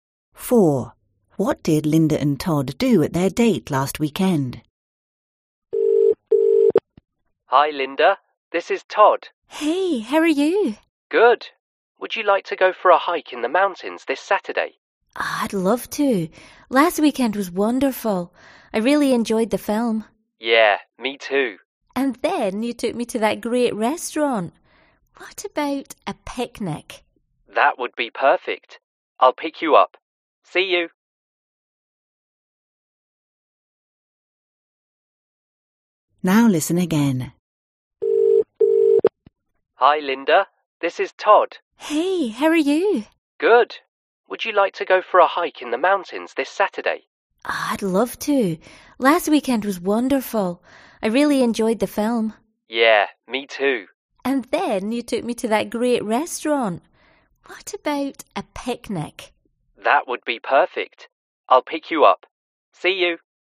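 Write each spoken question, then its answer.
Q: What did Linda and Todd do at their date last weekend?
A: They saw a film and went to a restaurant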